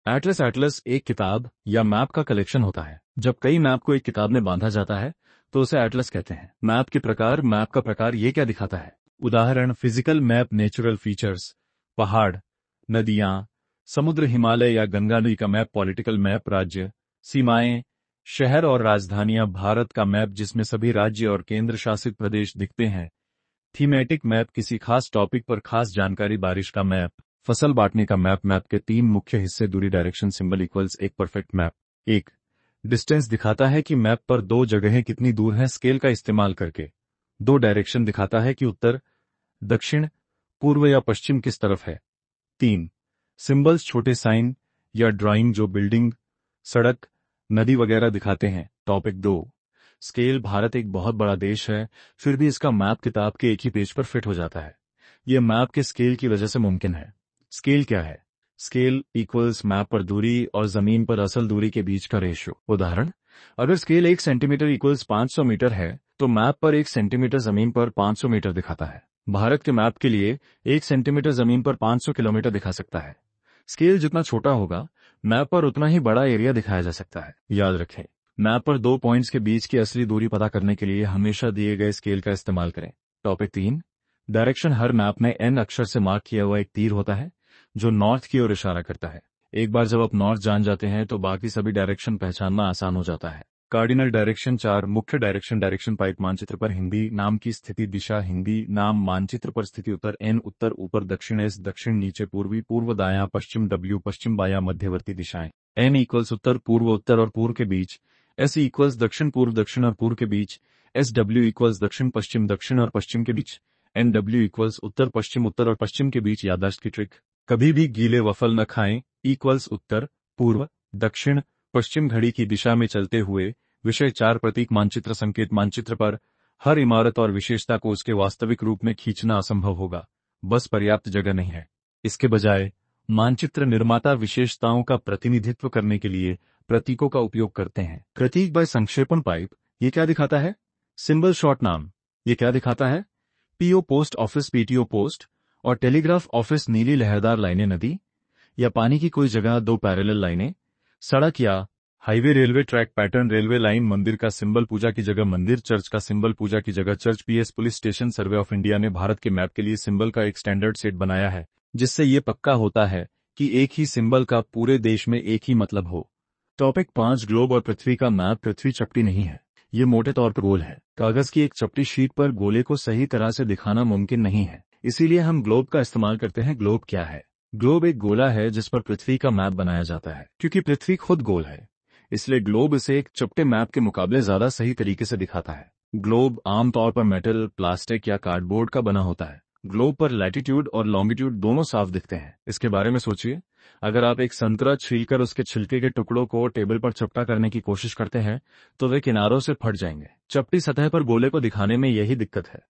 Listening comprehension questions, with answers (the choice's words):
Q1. A book or collection of maps is called a __________.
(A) Globe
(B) Atlas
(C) Scale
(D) Grid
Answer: Atlas

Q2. The three main components of a map are __________.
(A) Scale, Globe, Grid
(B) Distance, Direction, Symbols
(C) Latitude, Longitude, Time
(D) North, South, East, West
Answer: Distance, Direction, Symbols

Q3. A globe is __________.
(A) A flat map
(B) A measurement of scale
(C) A sphere on which a map of the Earth is drawn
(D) A page from an atlas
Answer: A sphere on which a map of the Earth is drawn

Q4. In map directions, 'SE' stands for __________.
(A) South-West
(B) North-East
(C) South-East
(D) North-West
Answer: South-East

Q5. Symbols are used on maps in order to __________.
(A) Make the map more colourful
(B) Show numerous features within a limited space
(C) Calculate distances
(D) Show the scale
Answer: Show numerous features within a limited space

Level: Class 6